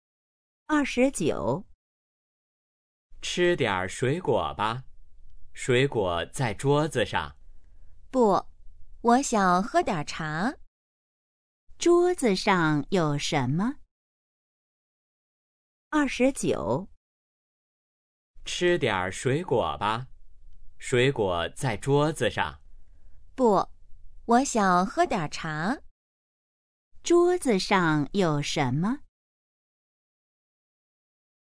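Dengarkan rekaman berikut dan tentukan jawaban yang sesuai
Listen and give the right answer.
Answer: 水果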